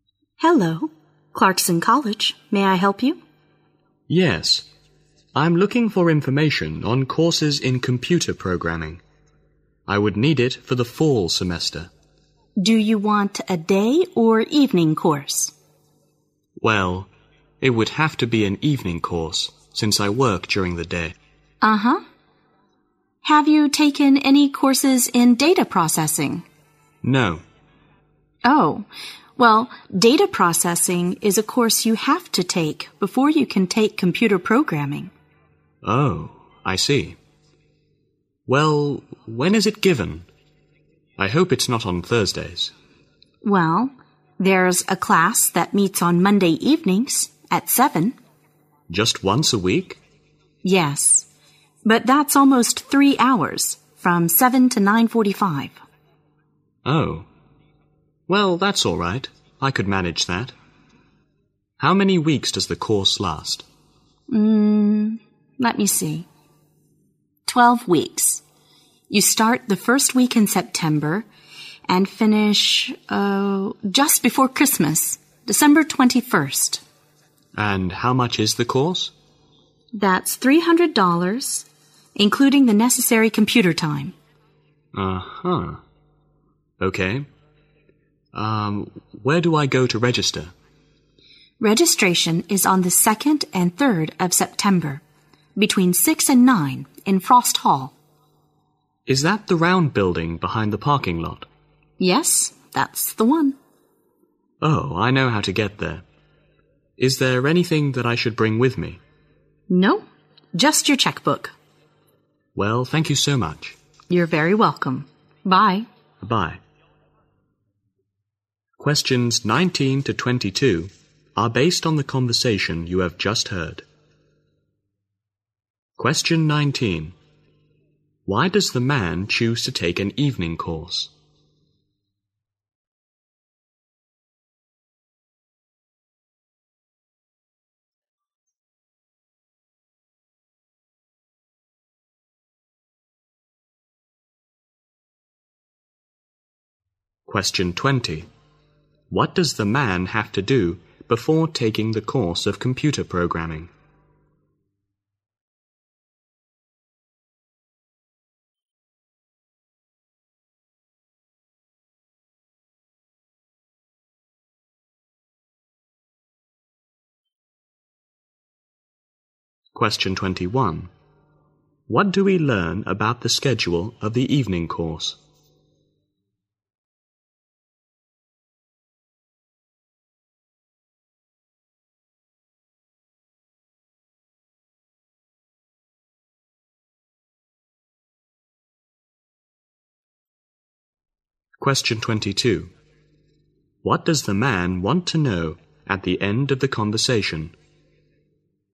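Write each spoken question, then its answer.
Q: Why does the man choose to take an evening course?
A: Because he works during the day.

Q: What does the man have to do before taking the course of computer programming?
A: Take a course in data processing.

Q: What do we learn about the schedule of the evening course?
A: It meets once a week, Monday evenings from 7 to 9:45, for 12 weeks.

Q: What does the man want to know at the end of the conversation?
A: Whether he should bring anything with him to registration.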